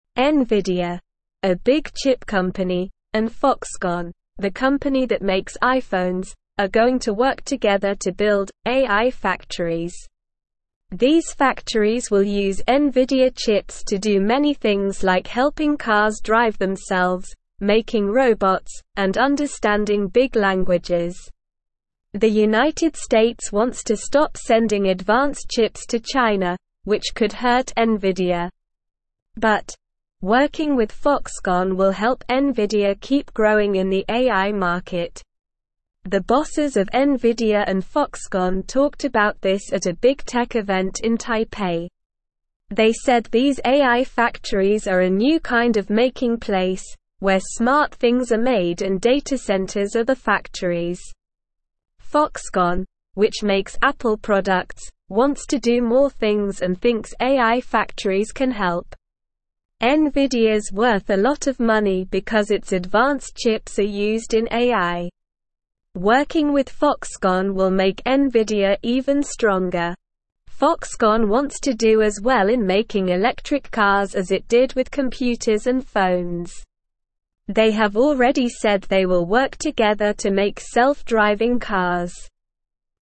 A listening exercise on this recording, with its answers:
Listen and Fill in the Gaps:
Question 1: Nvidia, a big chip company, and Foxconn, the company that makes (1)______,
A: iPhones

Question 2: are going to work together to build "AI (2)______."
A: factories

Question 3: The United States wants to stop sending (3)______ chips to China, which could hurt Nvidia.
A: advanced

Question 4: The bosses of Nvidia and Foxconn (4)______ about this at a big tech event in Taipei.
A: talked

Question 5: They said these AI factories are a new kind of making place, where smart (5)______ are made and data centers are the factories.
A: things

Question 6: Foxconn, which makes Apple products, wants to do more things and (6)______ AI factories can help.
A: thinks

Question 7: Foxconn wants to do as well in making (7)______ cars as it did with computers and (8)______.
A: electric

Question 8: Foxconn wants to do as well in making (7)______ cars as it did with computers and (8)______.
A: phones

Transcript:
Nvidia, a big chip company, and Foxconn, the company that makes iPhones, are going to work together to build "AI factories." These factories will use Nvidia chips to do many things like helping cars drive themselves, making robots, and understanding big languages. The United States wants to stop sending advanced chips to China, which could hurt Nvidia. But, working with Foxconn will help Nvidia keep growing in the AI market.
The bosses of Nvidia and Foxconn talked about this at a big tech event in Taipei. They said these AI factories are a new kind of making place, where smart things are made and data centers are the factories. Foxconn, which makes Apple products, wants to do more things and thinks AI factories can help. Nvidia's worth a lot of money because its advanced chips are used in AI. Working with Foxconn will make Nvidia even stronger. Foxconn wants to do as well in making electric cars as it did with computers and phones. They have already said they will work together to make self-driving cars.

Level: Level 1